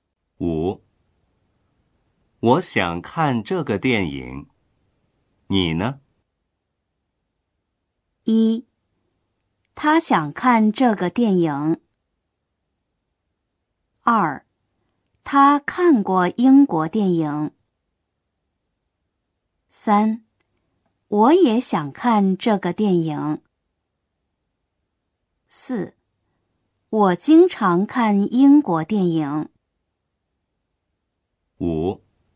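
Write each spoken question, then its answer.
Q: 我想看这个电影,你呢?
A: 3: 我也想看这个电影。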